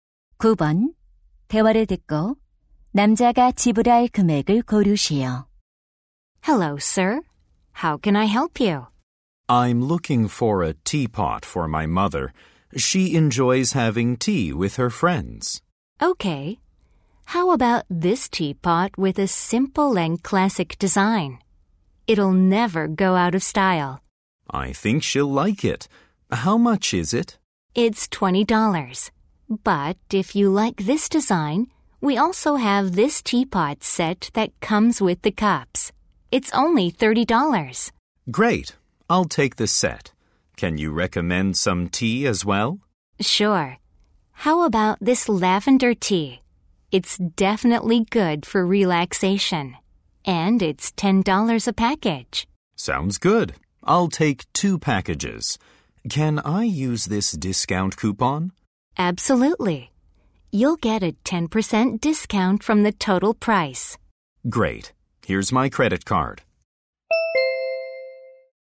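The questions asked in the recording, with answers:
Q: 대화를 듣고 남자가 지불할 금액을 고르시오.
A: 45달러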